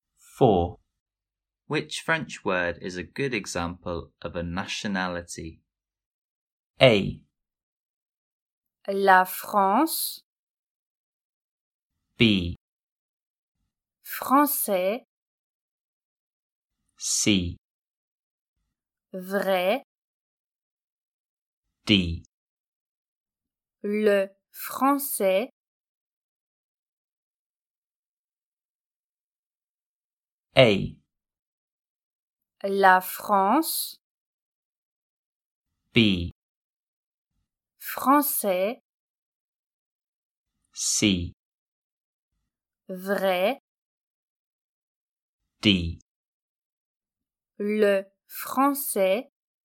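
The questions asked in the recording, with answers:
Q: Which French word is a good example of a nationality?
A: B: Français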